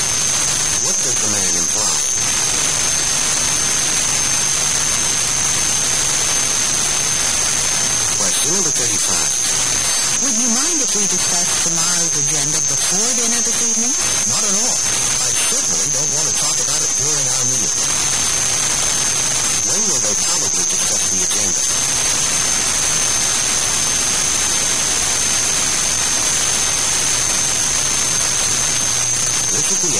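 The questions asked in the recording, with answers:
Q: When will they probably discuss the agenda?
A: Before dinner this evening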